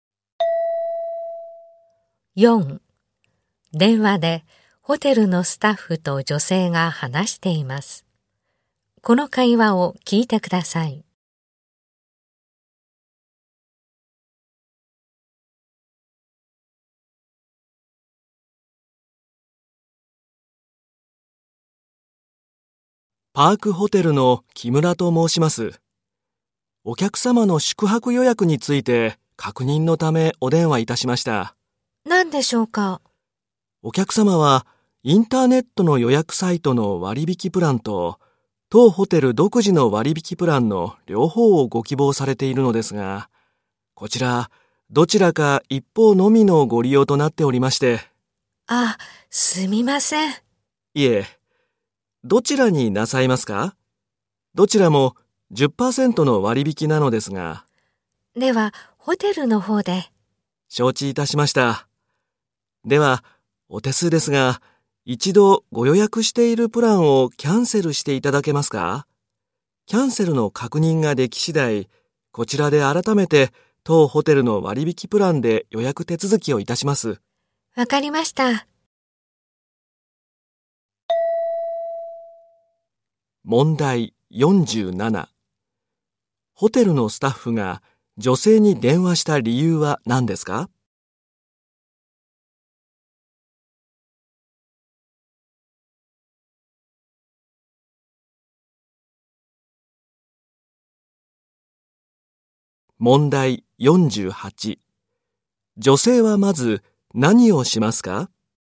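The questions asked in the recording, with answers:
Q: ホテルのスタッフが女性に電話した理由は何ですか?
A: 割引プランは両方使えず一方のみだから

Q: 女性はまず何をしますか?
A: 予約しているプランをキャンセルする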